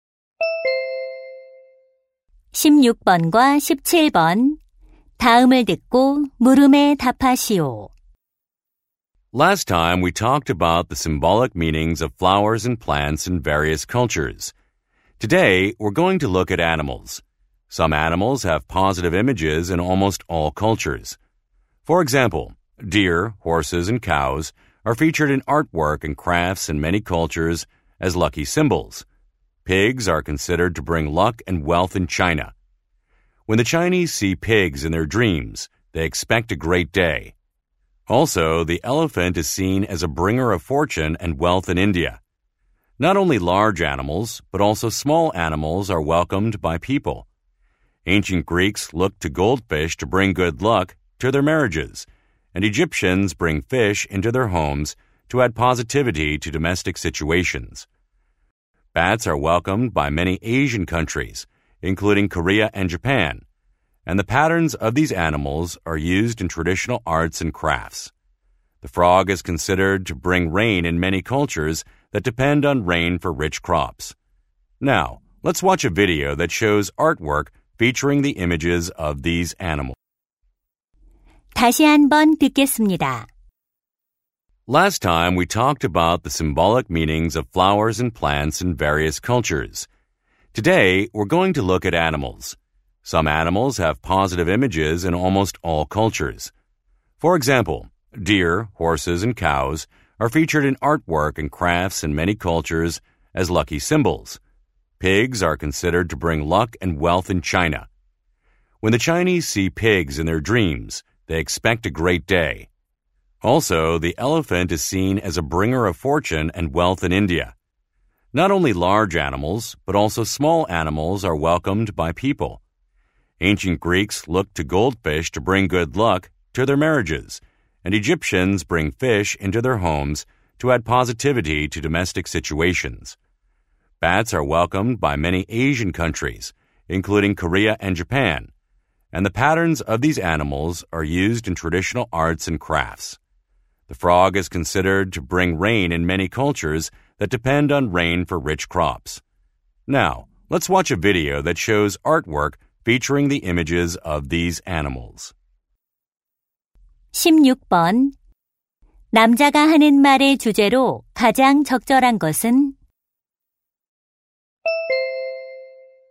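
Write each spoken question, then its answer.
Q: 남자가 하는 말의 주제로 가장 적절한 것은?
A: 여러 문화에서 행운을 상징하는 동물들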